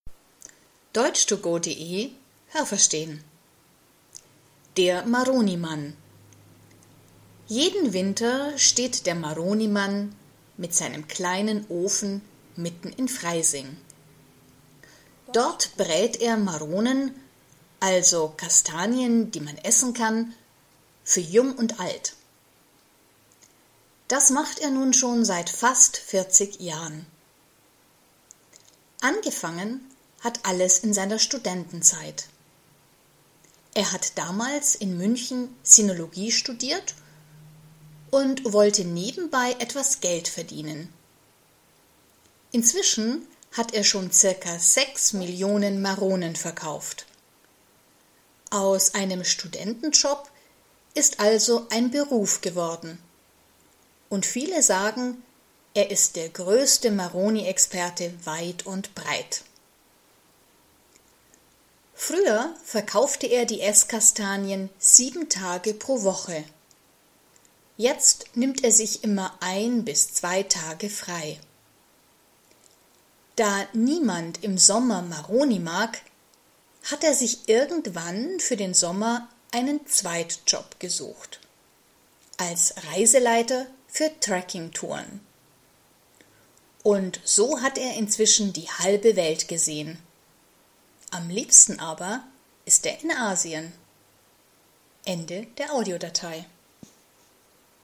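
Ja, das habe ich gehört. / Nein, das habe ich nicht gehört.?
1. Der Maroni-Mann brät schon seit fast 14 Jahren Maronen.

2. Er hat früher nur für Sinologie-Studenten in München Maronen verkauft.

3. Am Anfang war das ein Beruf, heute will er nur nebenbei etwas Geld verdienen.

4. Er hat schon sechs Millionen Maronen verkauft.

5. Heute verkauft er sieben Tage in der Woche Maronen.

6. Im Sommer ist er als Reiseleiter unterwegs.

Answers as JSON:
{"1": "Nein, das habe ich nicht gehört.", "2": "Nein, das habe ich nicht gehört.", "3": "Nein, das habe ich nicht gehört.", "4": "Ja, das habe ich gehört.", "5": "Nein, das habe ich nicht gehört.", "6": "Ja, das habe ich gehört."}

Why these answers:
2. Er hat früher selber Sinologie studiert. Der Text sagt nicht, dass er Sinologie-Studenten Maronen verkauft hat.
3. Es ist umgekehrt: Früher war das nur ein Studentenjob, heute ist das sein Beruf.
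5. Früher hat er das gemacht. Heute nimmt er sich immer ein bis zwei Tage frei.

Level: A2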